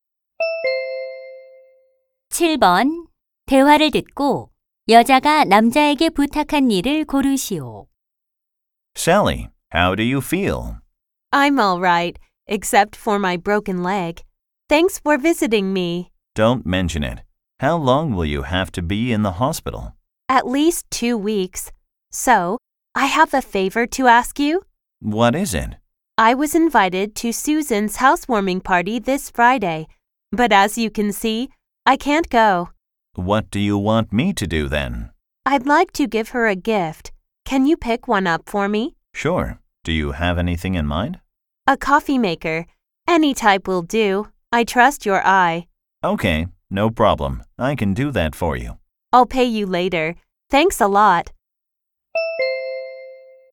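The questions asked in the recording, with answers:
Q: 대화를 듣고 여자가 남자에게 부탁한 일을 고르시오.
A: 집들이 선물(커피 메이커) 사 오기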